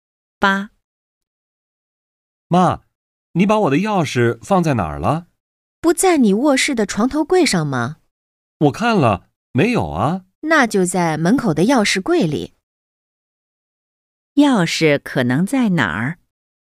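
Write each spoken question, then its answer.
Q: 钥匙可能在哪儿?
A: 门口的钥匙柜里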